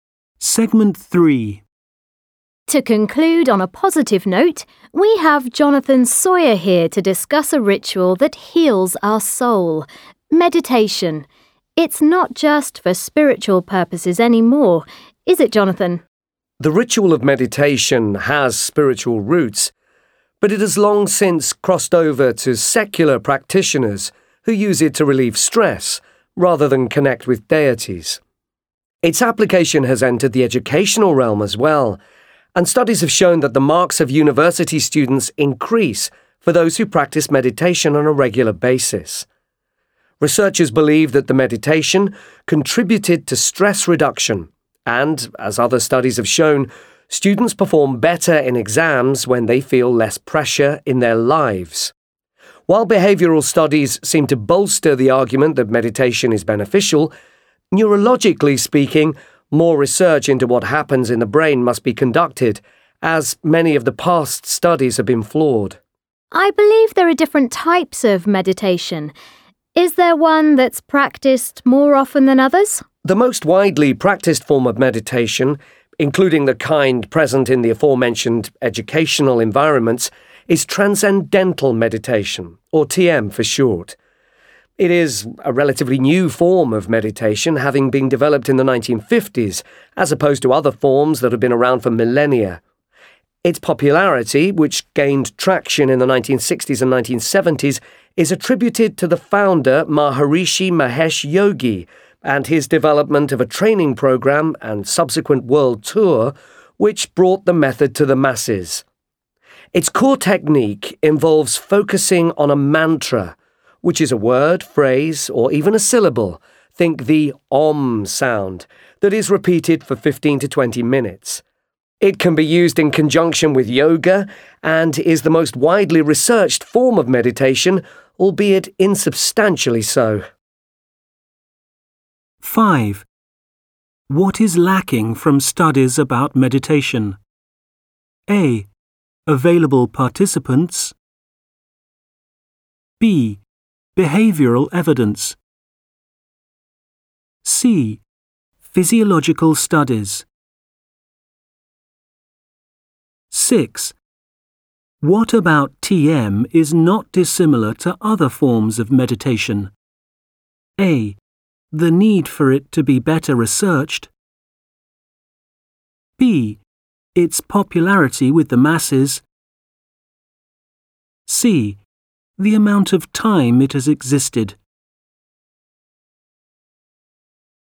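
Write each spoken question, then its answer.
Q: What is lacking from studies about meditation?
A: C: Physiological studies.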